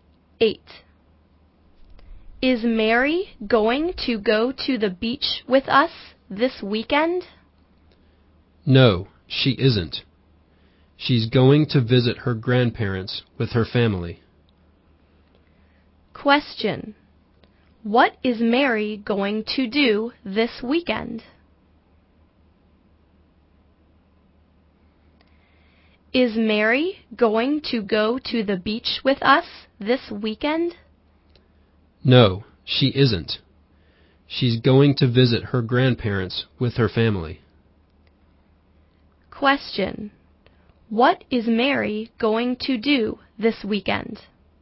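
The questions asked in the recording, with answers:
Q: What is Mary going to do this weekend?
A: Visit her grandparents with her family.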